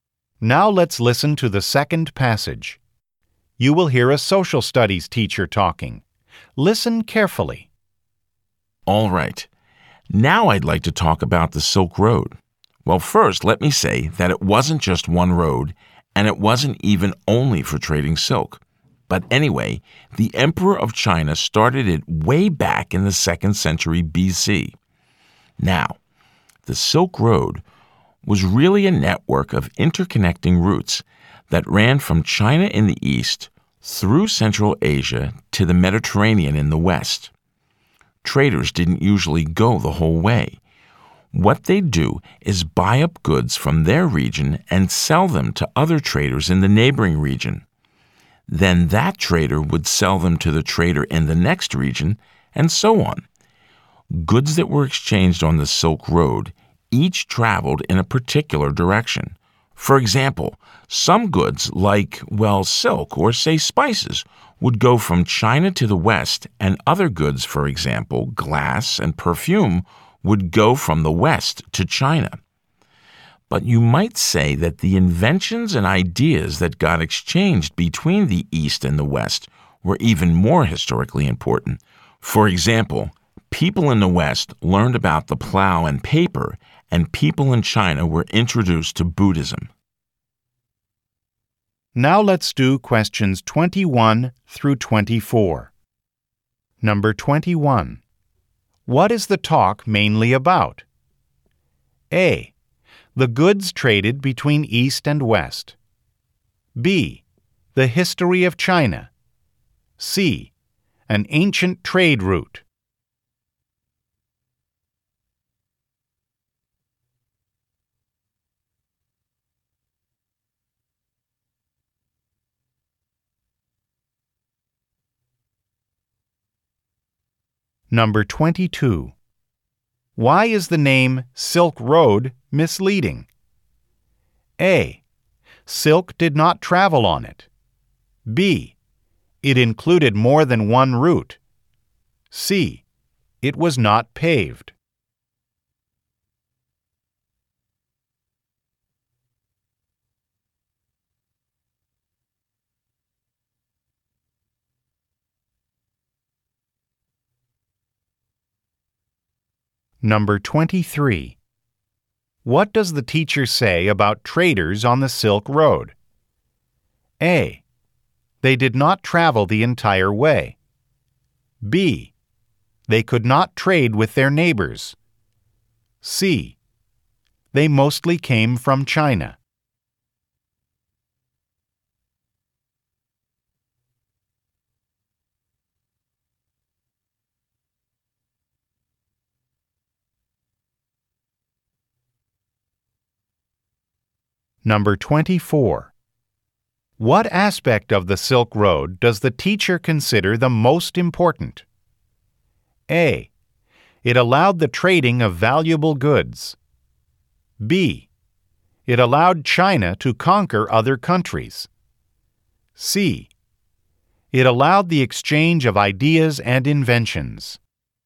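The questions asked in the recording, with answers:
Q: What is the talk mainly about?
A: C: An ancient trade route.

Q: Why is the name Silk Road misleading?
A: B: It included more than one route.

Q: What does the teacher say about traders on the Silk Road?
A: A: They did not travel the entire way.

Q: What aspect of the Silk Road does the teacher consider the most important?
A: C: It allowed the exchange of ideas and inventions.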